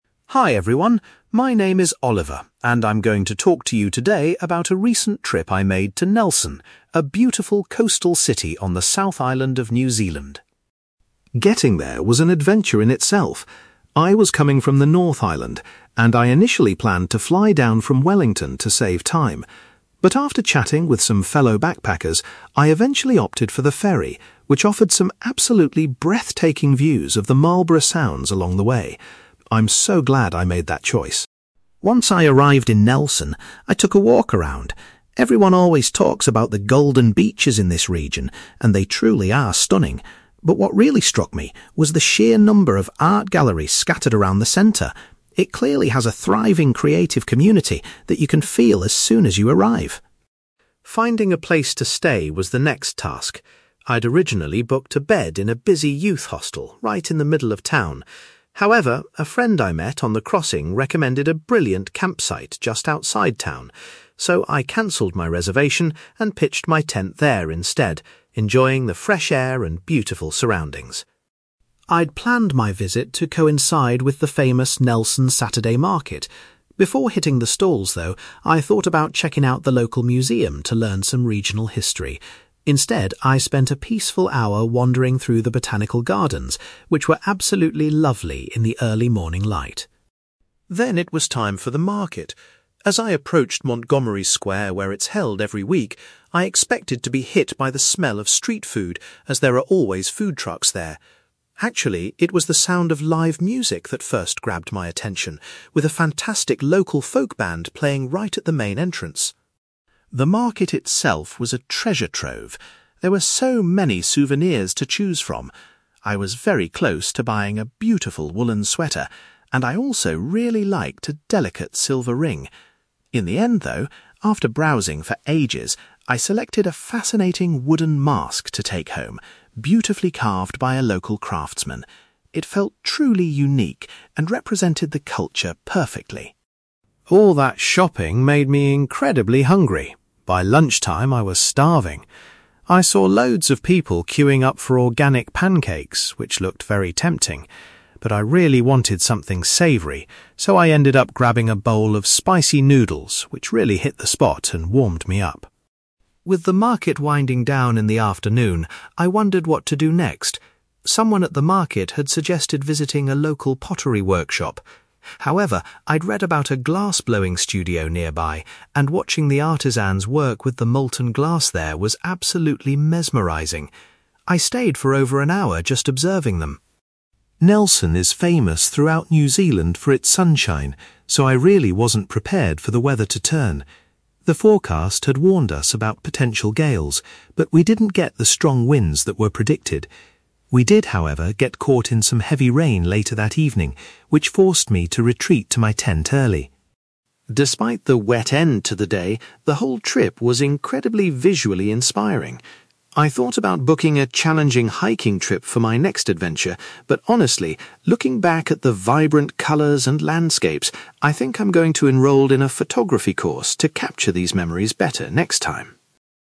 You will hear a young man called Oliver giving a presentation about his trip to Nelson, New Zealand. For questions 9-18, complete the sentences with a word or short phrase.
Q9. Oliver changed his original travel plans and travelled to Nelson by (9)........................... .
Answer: ferry

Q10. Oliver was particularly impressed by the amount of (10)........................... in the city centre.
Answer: art galleries

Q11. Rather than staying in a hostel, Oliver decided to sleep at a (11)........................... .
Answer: campsite

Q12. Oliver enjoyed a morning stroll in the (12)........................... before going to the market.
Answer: botanical gardens

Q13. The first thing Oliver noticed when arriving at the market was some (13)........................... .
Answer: live music

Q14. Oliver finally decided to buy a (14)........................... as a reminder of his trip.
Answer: wooden mask

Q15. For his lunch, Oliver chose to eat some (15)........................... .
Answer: spicy noodles

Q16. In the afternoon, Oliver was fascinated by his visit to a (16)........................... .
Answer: glass-blowing studio

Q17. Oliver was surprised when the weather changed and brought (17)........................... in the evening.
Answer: heavy rain

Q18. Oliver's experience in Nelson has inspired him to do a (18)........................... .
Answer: photography course

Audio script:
Oliver: Hi everyone. My name is Oliver, and I'm going to talk to you today about a recent trip I made to Nelson, a beautiful coastal city on the South Island of New Zealand.
Getting there was an adventure in itself. I was coming from the North Island, and I initially planned to fly down from Wellington to save time. But after chatting with some fellow backpackers, I eventually opted for the ferry, which offered some absolutely breathtaking views of the Marlborough Sounds along the way. I'm so glad I made that choice.
Once I arrived in Nelson, I took a walk around. Everyone always talks about the golden beaches in this region, and they truly are stunning, but what really struck me was the sheer number of art galleries scattered around the centre. It clearly has a thriving creative community that you can feel as soon as you arrive.
Finding a place to stay was the next task. I'd originally booked a bed in a busy youth hostel right in the middle of town. However, a friend I met on the crossing recommended a brilliant campsite just outside town. So, I cancelled my reservation and pitched my tent there instead, enjoying the fresh air and beautiful surroundings.
I'd planned my visit to coincide with the famous Nelson Saturday Market. Before hitting the stalls, though, I thought about checking out the local museum to learn some regional history. Instead, I spent a peaceful hour wandering through the botanical gardens, which were absolutely lovely in the early morning light.
Then it was time for the market. As I approached Montgomery Square where it's held every week, I expected to be hit by the smell of street food, as there are always food trucks there. Actually, it was the sound of live music that first grabbed my attention, with a fantastic local folk band playing right at the main entrance.
The market itself was a treasure trove. There were so many souvenirs to choose from. I was very close to buying a beautiful woollen sweater, and I also really liked a delicate silver ring. In the end, though, after browsing for ages, I selected a fascinating wooden mask to take home, beautifully carved by a local craftsman. It felt truly unique and represented the culture perfectly.
All that shopping made me incredibly hungry. By lunchtime, I was starving. I saw loads of people queuing up for organic pancakes, which looked very tempting. But I really wanted something savoury, so I ended up grabbing a bowl of spicy noodles which really hit the spot and warmed me up.
With the market winding down in the afternoon, I wondered what to do next. Someone at the market had suggested visiting a local pottery workshop. However, I'd read about a glass-blowing studio nearby, and watching the artisans work with the molten glass there was absolutely mesmerizing. I stayed for over an hour just observing them.
Nelson is famous throughout New Zealand for its sunshine, so I really wasn't prepared for the weather to turn. The forecast had warned us about potential gales, but we didn't get the strong winds that were predicted. We did, however, get caught in some heavy rain later that evening, which forced me to retreat to my tent early!
Despite the wet end to the day, the whole trip was incredibly visually inspiring. I thought about booking a challenging hiking trip for my next adventure, but honestly, looking back at the vibrant colours and landscapes, I think I'm going to enrol in a photography course to capture these memories better next time.

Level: B2